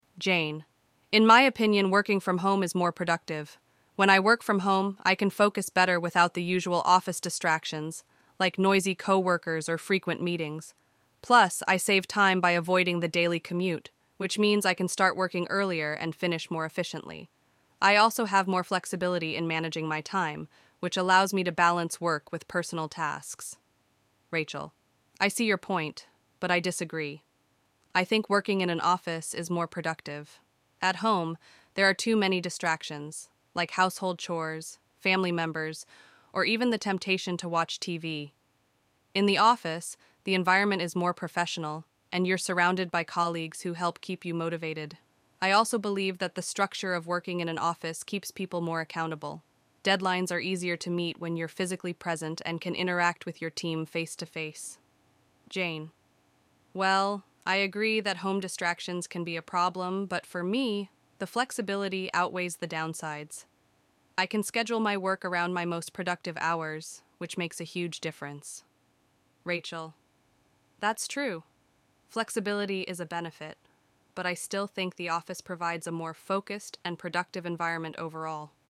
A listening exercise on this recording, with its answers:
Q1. What is the main reason Jane prefers working from home?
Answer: Jane prefers working from home because she can focus better without the office distractions and save time by avoiding the commute.

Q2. According to Rachel, what are some distractions of working from home?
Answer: Rachel mentions household chores, family members, and the temptation to watch TV as distractions at home.

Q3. What advantage does Jane mention regarding the flexibility of working from home?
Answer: Jane highlights that the flexibility allows her to schedule her work around her most productive hours.

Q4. Does Rachel completely disagree with Jane's points? If not, what does Rachel agree with?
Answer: No, Rachel does not completely disagree. She agrees that flexibility is a benefit of working from home.

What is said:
Jane:
"In my opinion, working from home is more productive. When I work from home, I can focus better without the usual office distractions, like noisy co-workers or frequent meetings. Plus, I save time by avoiding the daily commute, which means I can start working earlier and finish more efficiently. I also have more flexibility in managing my time, which allows me to balance work with personal tasks."
Rachel:
"I see your point, but I disagree. I think working in an office is more productive. At home, there are too many distractions—like household chores, family members, or even the temptation to watch TV. In the office, the environment is more professional, and you're surrounded by colleagues who help keep you motivated. I also believe that the structure of working in an office keeps people more accountable. Deadlines are easier to meet when you're physically present and can interact with your team face-to-face."
Jane:
"Well, I agree that home distractions can be a problem, but for me, the flexibility outweighs the downsides. I can schedule my work around my most productive hours, which makes a huge difference."
Rachel:
"That's true. Flexibility is a benefit, but I still think the office provides a more focused and productive environment overall."